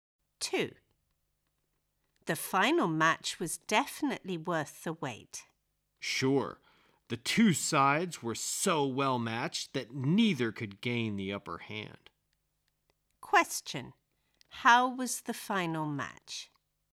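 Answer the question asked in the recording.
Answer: It was closely matched, neither side could gain the upper hand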